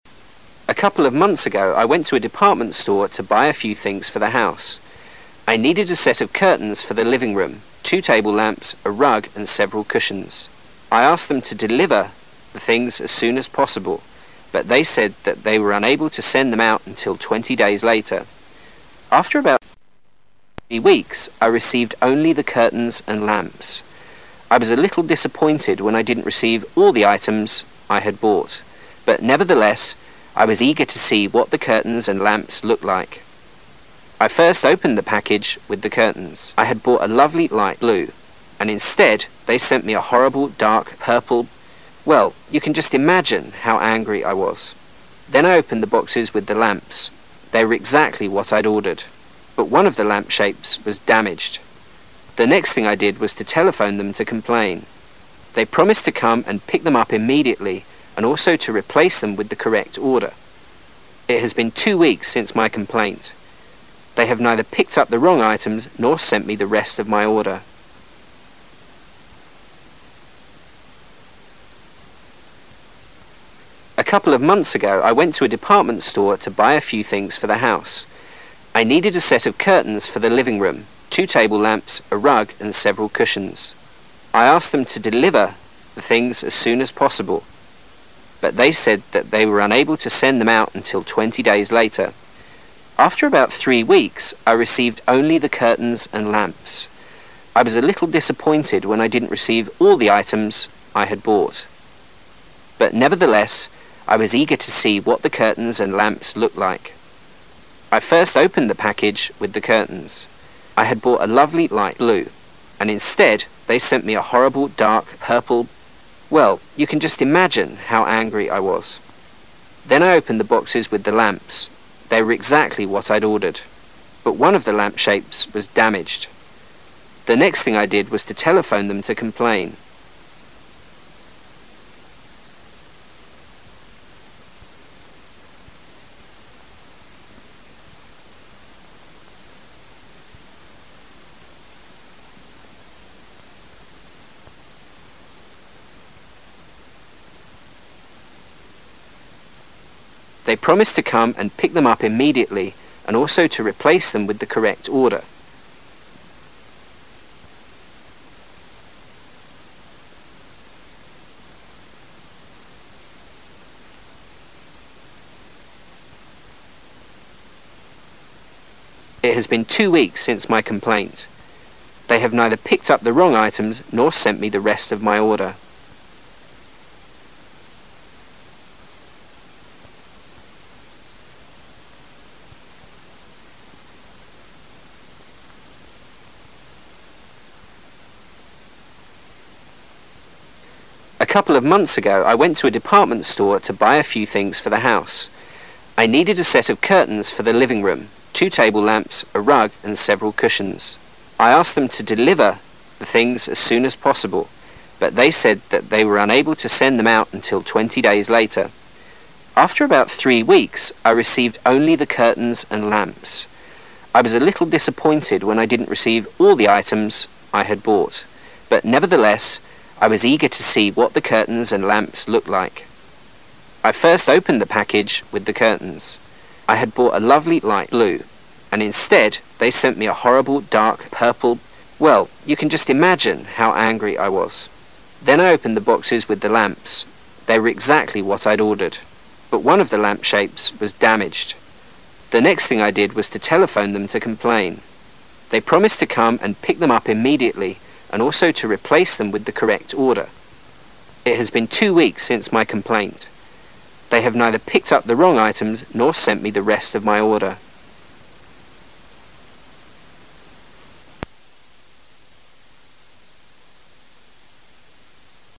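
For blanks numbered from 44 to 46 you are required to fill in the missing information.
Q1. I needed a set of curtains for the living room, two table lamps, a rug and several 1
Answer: cushions

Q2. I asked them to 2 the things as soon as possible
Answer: deliver

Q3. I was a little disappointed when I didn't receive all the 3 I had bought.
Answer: items

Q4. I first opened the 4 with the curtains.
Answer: package

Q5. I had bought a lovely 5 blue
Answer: light

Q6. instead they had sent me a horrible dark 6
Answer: purple

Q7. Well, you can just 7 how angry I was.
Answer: imagine

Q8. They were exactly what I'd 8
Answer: ordered

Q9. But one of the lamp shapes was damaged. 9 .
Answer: The next thing I did was to telephone them to complain

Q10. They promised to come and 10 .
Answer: pick them up immediately and also to re place them with the correct order

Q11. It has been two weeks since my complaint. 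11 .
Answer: They have neither picked up the wrong items nor sent me the rest of my order

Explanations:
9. next thing,telephone,complain [答案重构] The next thing I did was to phone/ call them to complain [画龙点睛] 不定式作表语,此处不可省略to。注意时态以及complain的拼写。
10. pick immediately,replace,correct order [答案重构] get them back at once and to replace them with the correct items [画龙点睛] 注意短语replace... with以及immediately的拼写,如果没把握,可以换成at once。
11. neither,wrong items,nor,rest,order [答案重构] 1 They haven't picked up the wrong items or sent me the rest of my order 2 They haven't picked up the wrong items,nor have they sent me the rest of my order [画龙点睛] 此题注意neither... nor结构中的两个动词的过去分词。改写时要注意两个动词的否定。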